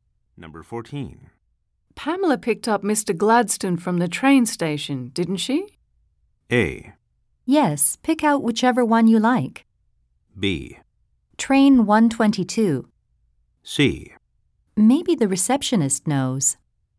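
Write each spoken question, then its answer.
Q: Pamela picked up Mr. Gladstone from the train station, didn't she?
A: C: Maybe the receptionist knows.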